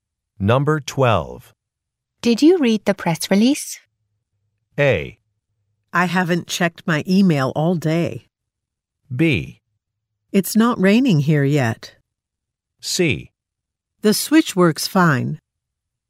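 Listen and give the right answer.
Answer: A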